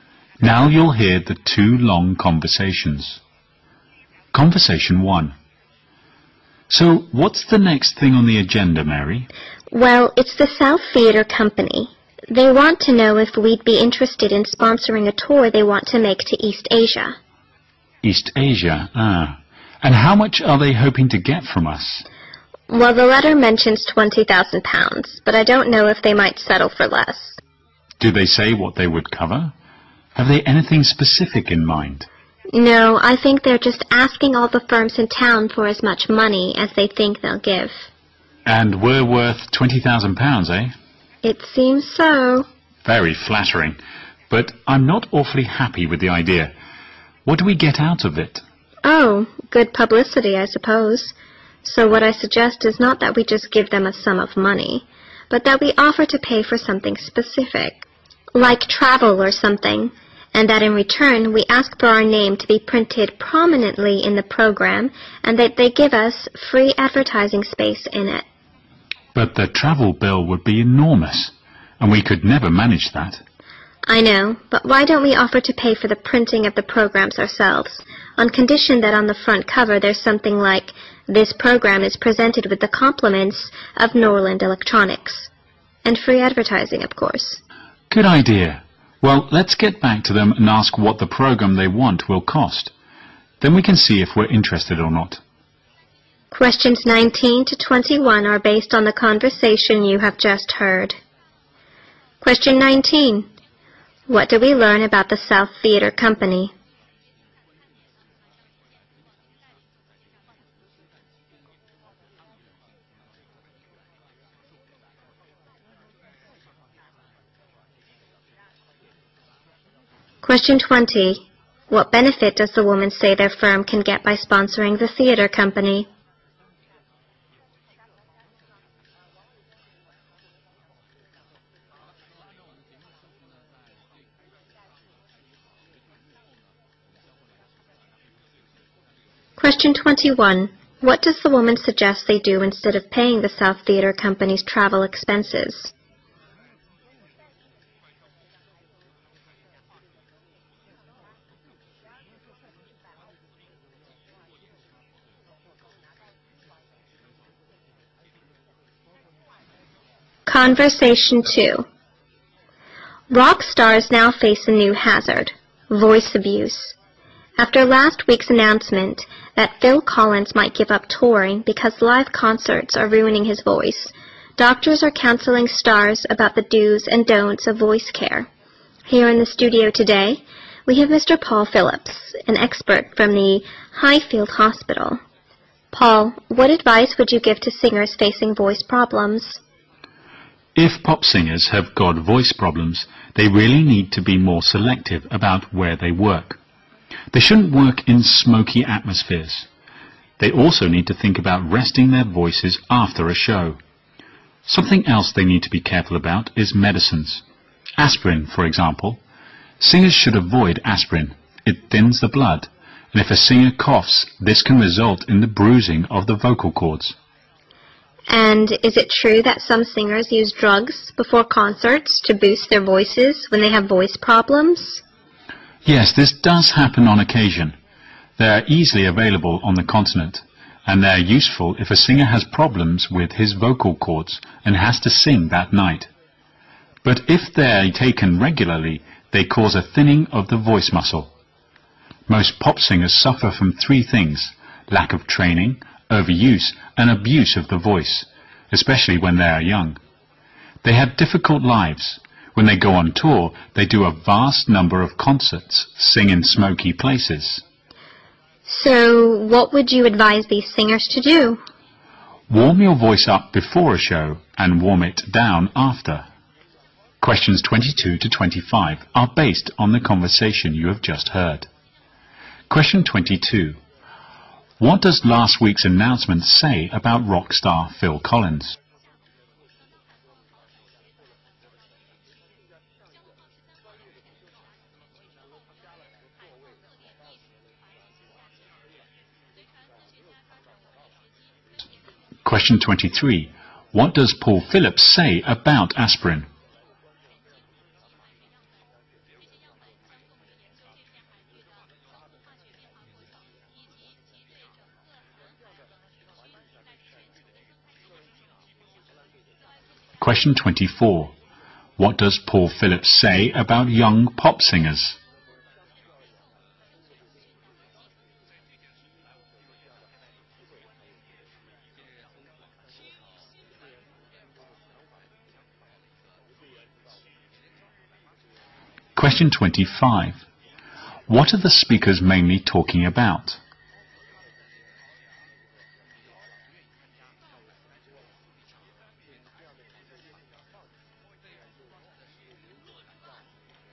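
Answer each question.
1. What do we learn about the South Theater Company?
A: It is seeking sponsorship for a tour of East Asia.

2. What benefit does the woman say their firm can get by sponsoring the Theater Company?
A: Good publicity.

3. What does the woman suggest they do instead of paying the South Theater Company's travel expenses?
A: Pay for printing the programmes.

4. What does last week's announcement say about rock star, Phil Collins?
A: He might stop touring because live concerts are ruining his voice.

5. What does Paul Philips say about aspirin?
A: Singers should avoid it because it thins the blood.

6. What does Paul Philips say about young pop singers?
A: They lack training and overuse and abuse their voices.

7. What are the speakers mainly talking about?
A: Voice care for rock singers.

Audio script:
W: I'm sorry, sir, but we can't give you a refill on that. You'll have to get a new prescription.
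Q: What can we infer from the conversation?
They want to know if we'd be interested in sponsoring a tour they want to make to East Asia.
M: East Asia? uhh... and how much are they hoping to get from us?
W: Well, the letter mentions 20,000 pounds, but I don't know if they might settle for us.
M: Do they say what they would cover? Have they anything specific in mind?
W: No, I think they are just asking all the firms in tongue for as much money as they think they'll give.
M: And we are worth 20, 000 pounds, right?
W: It seems so.
M: Very flattering. But I am not awfully happy with the idea. What we get out of it?
W: Oh, good publicity I suppose. So what I suggest is not that we just give them a sum of money, but that we offer to pay for something specific like travel or something, and that in return, we ask for our name to be printed prominently in the program, and that they give us free advertising space in it.
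M: But the travel bill would be enormous, and we could never manage that.
W: I know. But why don't we offer to pay for the printing of the programs ourselves on condition that on the front cover there's something like This program is presented with the compliments of Norland Electronics, and free advertising of course.
M: Good idea. Well, let's get back to them and ask what the program they want will cost. Then we can see if we are interested or not.
Questions 19-21 are based on the conversation you have just heard.
Conversation Two
W: Rock stars now face a new hazard --- voice abuse. After last week's announcement that Phil Collins might give up touring because live concerts are ruining his voice, doctors are counseling stars about the dos and don'ts of voice care. Here in the studio today, we have Mr. Paul Phillips, an expert from the High Field Hospital. Paul, what advice would you give to singers facing voice problems?
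M: If pop singers have got voice problems, they really need to be more selective about where they work. They shouldn't work in smoky atmospheres. They also need to think about resting their voices after a show. Something else they need to be careful about is medicines. Aspirin, for example, singers should avoid aspirin. It thins the blood. And if a singer coughs, this can result in the bruising of the vocal cords.
W: And is it true that some singers use drugs before concerts to boost their voices when they have voice problems?
M: Yes, this does happen on occasion. They are easily-available on the continent and they are useful if a singer has problems with his vocal cords and has to sing that night. But if they are taken regularly, they cause a thinning of the voice muscle. Most pop singers suffer from three things: lack of training, overuse and abuse of the voice, especially when they are young. 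They have difficult lives. When they go on tour, they do a vast number of concerts, singing in smoky places.
W: So, what would you advise the singers to do?
M: Warm you voice up before a show and warm it down after.

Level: 六级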